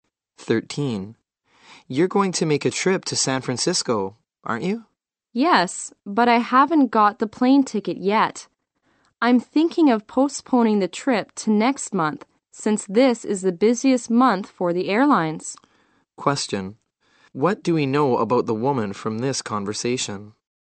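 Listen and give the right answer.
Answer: She may postpone her trip to San Francisco to next month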